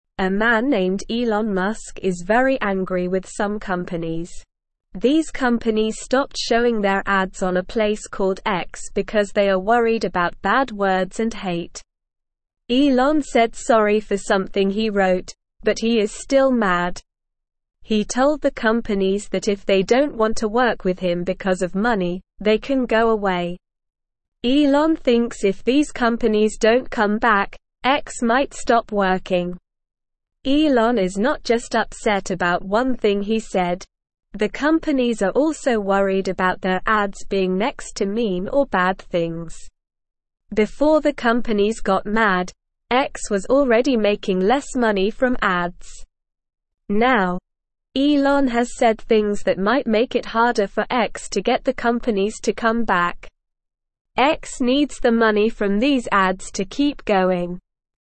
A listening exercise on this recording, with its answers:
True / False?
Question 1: The companies stopped showing their ads on a place called X.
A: True

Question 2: The companies are worried about bad words and hate.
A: True

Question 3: Elon Musk thinks X might stop working if the companies don't come back.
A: True

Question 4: Elon Musk asked the companies to stay if they don't want to work with him because of money.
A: False

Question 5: Elon Musk is calm even after apologizing.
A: False

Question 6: Elon Musk is satisfied with some companies.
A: False

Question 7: Elon Musk refused to apologize for something he wrote.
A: False

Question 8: X needs the money from the ads to keep going.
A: True

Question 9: Who is angry with some companies?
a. Mark Zuckerberg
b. Jeff Bezos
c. Bill Gates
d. Elon Musk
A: Elon Musk

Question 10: Why did the companies stop showing their ads on X?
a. They didn't have enough money.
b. They didn't like the design of X.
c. They wanted to advertise somewhere else.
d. They were worried about bad words and hate.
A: They were worried about bad words and hate.

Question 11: What did Elon say to the companies?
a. If they don't want to work with him because of his hair, they can go away.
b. If they don't want to work with him because of his favorite color, they can go away.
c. If they don't want to work with him because of money, they can go away.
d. If they don't want to work with him because of his pet dog, they can go away.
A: If they don't want to work with him because of money, they can go away.

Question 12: Why is Elon upset?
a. He lost his favorite toy.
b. He said something he regrets.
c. He forgot his lunch at home.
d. He got a new haircut.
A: He said something he regrets.

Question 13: What are the companies worried about?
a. Their ads being next to happy and good things.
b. Their ads being next to mean or bad things.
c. Their ads being next to the ocean.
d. Their ads being next to a tree.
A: Their ads being next to mean or bad things.

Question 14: What was happening to X before the companies got mad?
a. X was making more money from ads.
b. X was giving away free ads.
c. X was already making less money from ads.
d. X was selling ads to other companies.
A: X was already making less money from ads.

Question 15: What might make it harder for X to get the companies to come back?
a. Things Elon said.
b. Things Mark said.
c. Things Jeff said.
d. Things Bill said.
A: Things Elon said.

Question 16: What does X need the money from ads for?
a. To keep going.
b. To buy new toys.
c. To go on vacation.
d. To buy a new car.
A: To keep going.

Listen and Fill in the Gaps:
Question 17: These companies (1)______ showing their ads on a (2)______ called X because they are worried about bad words and hate.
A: stopped

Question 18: These companies (1)______ showing their ads on a (2)______ called X because they are worried about bad words and hate.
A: place

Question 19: He told the companies that if they don't (3)______ to work with him because of money, they can go away.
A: want

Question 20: (4)______ thinks if these companies don't come back, X might stop (5)______.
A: Elon

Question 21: (4)______ thinks if these companies don't come back, X might stop (5)______.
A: working

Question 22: Elon is not just (6)______ about one thing he said.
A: upset

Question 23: Before the companies got mad, X was already making less (7)______ from ads.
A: money

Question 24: Now, Elon has said things that might make it harder for X to get the (8)______ to come back.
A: companies

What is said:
A man named Elon Musk is very angry with some companies. These companies stopped showing their ads on a place called X because they are worried about bad words and hate. Elon said sorry for something he wrote, but he is still mad. He told the companies that if they don't want to work with him because of money, they can go away. Elon thinks if these companies don't come back, X might stop working.
Elon is not just upset about one thing he said. The companies are also worried about their ads being next to mean or bad things. Before the companies got mad, X was already making less money from ads. Now, Elon has said things that might make it harder for X to get the companies to come back. X needs the money from these ads to keep going.

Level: Level 1

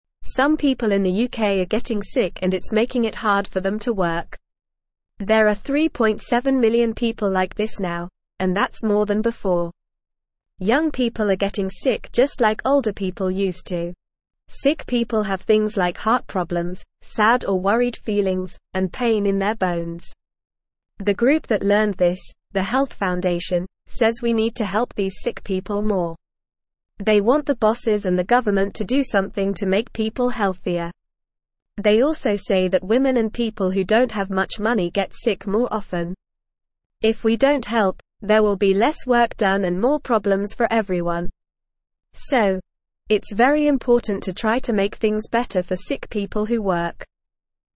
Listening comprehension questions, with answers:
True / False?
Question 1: It's not important to make things better for sick people who work.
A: False

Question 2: Sick people can have heart problems, sad or worried feelings, and pain in their bones.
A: True

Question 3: Men and people with more money get sick more often.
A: False

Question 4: Young people are getting sick just like older people used to.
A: True

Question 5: In the UK, few people are getting sick and it's easy for them to work.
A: False

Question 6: The Health Foundation does not want the bosses and the government to help sick people more.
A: False

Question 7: If we don't help sick people, there will be less work done and more problems for everyone.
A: True

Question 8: There are now more than 3.7 million sick people in the UK.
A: True

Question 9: Some people in the UK are getting sick and it's making it (1)______ for them to work.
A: hard

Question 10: (2)______ people are getting sick just like older people used to.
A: Young

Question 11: Sick people have (3)______ like heart problems, sad or worried feelings, and pain in their (4)______.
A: things

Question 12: Sick people have (3)______ like heart problems, sad or worried feelings, and pain in their (4)______.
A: bones

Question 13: The group that learned this, the Health Foundation, says we need to help these (5)______ people more.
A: sick

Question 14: They (6)______ the bosses and the government to do something to make people healthier.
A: want

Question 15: So, it's very important to try to (7)______ things better for sick (8)______ who work.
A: make

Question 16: So, it's very important to try to (7)______ things better for sick (8)______ who work.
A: people

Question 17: How many people in the UK are getting sick and finding it hard to work?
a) 3.7 million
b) 1 million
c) 500,000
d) 10 million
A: 3.7 million

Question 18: Who is getting sick in the UK?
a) Only young people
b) Only older people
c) No one is getting sick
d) Young people and older people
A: Young people and older people

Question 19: What are some problems that sick people have?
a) Happy feelings and strong bones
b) No problems at all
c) Headaches and stomachaches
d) Heart problems, sad or worried feelings, and pain in their bones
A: Heart problems, sad or worried feelings, and pain in their bones

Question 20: Who is the group that wants to help sick people?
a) The Government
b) The Bosses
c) The Health Foundation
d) No one wants to help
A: The Health Foundation

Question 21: Who gets sick more often?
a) Men and people who have a lot of money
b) Women and people who don't have much money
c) Women and people who have a lot of money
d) Men and people who don't have much money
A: Women and people who don't have much money

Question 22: What will happen if we don't help sick people?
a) Everything will stay the same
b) Everyone will be happy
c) There will be less work done and more problems for everyone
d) More work will be done and fewer problems for everyone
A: There will be less work done and more problems for everyone

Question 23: Who should do something to make people healthier?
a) No one should do anything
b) The bosses and the government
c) The sick people themselves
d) The doctors and nurses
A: The bosses and the government

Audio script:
Some people in the UK are getting sick and it's making it hard for them to work. There are 3.7 million people like this now, and that's more than before. Sick people have things like heart problems, sad or worried feelings, and pain in their bones.
The group that learned this, the Health Foundation, says we need to help these sick people more. They want the bosses and the government to do something to make people healthier. They also say that women and people who don't have much money get sick more often. If we don't help, there will be less work done and more problems for everyone. So, it's very important to try to make things better for sick people who work.

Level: Level 1

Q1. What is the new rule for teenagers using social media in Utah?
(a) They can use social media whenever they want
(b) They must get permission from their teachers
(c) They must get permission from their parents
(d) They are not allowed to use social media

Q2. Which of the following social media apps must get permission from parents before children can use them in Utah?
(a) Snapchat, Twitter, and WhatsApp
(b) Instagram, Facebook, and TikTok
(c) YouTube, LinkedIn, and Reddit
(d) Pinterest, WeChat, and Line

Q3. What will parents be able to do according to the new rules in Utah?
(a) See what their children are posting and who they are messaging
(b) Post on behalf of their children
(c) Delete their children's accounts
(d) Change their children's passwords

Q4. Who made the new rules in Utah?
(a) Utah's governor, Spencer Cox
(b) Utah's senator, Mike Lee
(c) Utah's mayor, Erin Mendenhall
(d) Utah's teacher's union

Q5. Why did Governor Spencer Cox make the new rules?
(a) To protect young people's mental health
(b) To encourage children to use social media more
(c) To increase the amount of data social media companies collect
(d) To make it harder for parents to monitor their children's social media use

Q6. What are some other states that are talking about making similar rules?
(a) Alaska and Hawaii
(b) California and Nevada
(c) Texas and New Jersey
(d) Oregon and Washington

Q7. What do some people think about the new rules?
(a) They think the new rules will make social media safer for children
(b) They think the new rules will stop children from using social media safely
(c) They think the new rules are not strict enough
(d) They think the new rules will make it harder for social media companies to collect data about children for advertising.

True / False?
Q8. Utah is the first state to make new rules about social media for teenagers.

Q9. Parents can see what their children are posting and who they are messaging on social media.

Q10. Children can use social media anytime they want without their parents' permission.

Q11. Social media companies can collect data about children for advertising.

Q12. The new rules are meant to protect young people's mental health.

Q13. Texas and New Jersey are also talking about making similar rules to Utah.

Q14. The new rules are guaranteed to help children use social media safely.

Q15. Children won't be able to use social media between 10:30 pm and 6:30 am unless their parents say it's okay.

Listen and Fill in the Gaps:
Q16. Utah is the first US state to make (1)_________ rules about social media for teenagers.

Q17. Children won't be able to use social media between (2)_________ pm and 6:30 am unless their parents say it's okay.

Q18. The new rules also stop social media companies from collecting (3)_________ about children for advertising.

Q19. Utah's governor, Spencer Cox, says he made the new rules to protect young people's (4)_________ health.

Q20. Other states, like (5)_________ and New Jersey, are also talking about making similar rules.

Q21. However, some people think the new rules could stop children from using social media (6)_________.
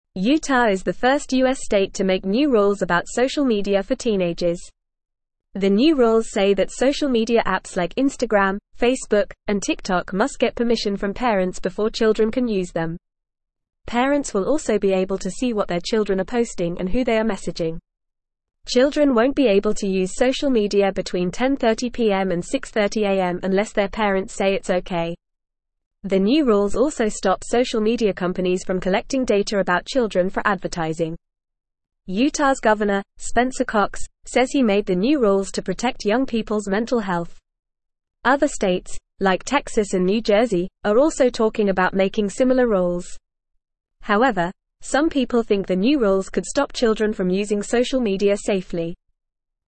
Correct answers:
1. They must get permission from their parents
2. Instagram, Facebook, and TikTok
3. See what their children are posting and who they are messaging
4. Utah's governor, Spencer Cox
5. To protect young people's mental health
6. Texas and New Jersey
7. They think the new rules will stop children from using social media safely
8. True
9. True
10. False
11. False
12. True
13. True
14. False
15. True
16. new
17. 10:30
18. data
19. mental
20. Texas
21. safely

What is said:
Utah is the first US state to make new rules about social media for teenagers. The new rules say that social media apps like Instagram, Facebook, and TikTok must get permission from parents before children can use them. Parents will also be able to see what their children are posting and who they are messaging. The new rules also stop social media companies from collecting data about children for advertising. Utah's governor, Spencer Cox, says he made the new rules to protect young people's mental health. Other states, like Texas and New Jersey, are also talking about making similar rules. However, some people think the new rules could stop children from using social media safely.

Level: Level 1

